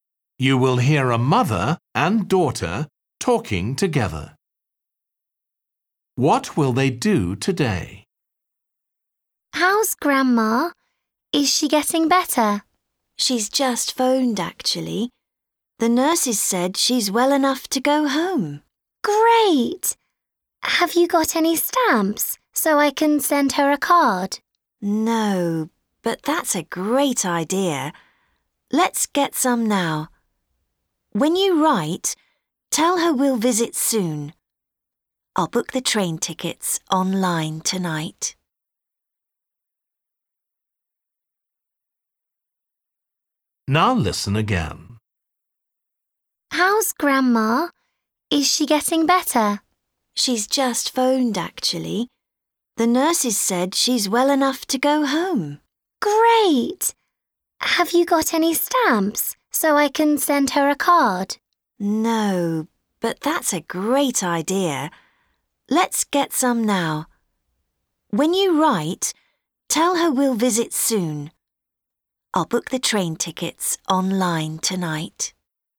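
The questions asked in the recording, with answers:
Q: What will they do today?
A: Buy some stamps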